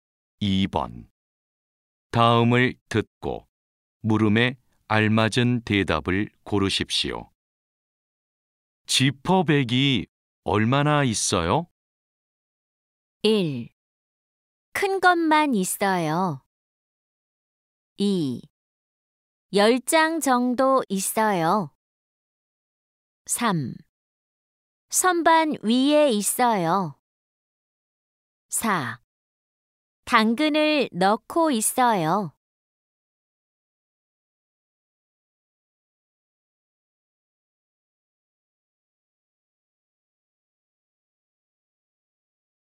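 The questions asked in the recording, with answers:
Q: 지퍼백이 얼마나 있어요?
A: 2: 10장 정도 있어요.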